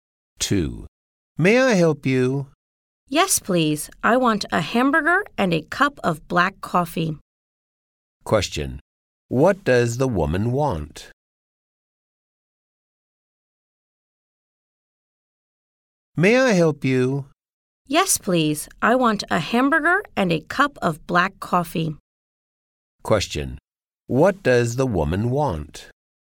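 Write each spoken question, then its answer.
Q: Question, what does the woman want?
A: A hamburger and a cup of black coffee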